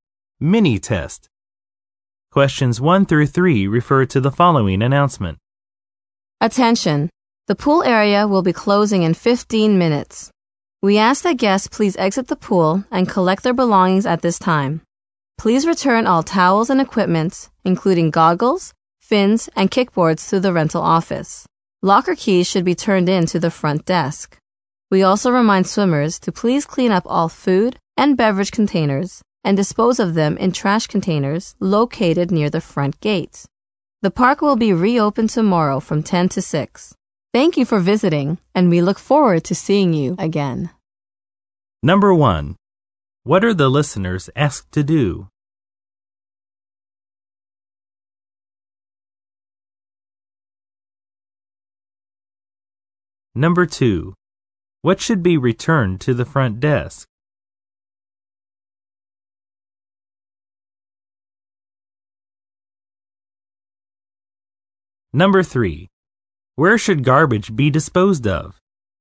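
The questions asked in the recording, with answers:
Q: What are the listeners asked to do?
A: Exit the pool and collect their belongings

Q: What should be returned to the front desk?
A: Locker keys

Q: Where should garbage be disposed of?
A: In trash containers near the front gate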